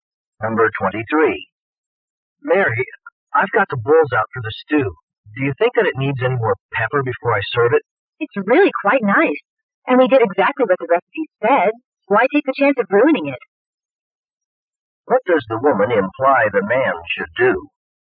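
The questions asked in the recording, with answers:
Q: What does the woman imply the man should do?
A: Not add more pepper; serve the stew as it is.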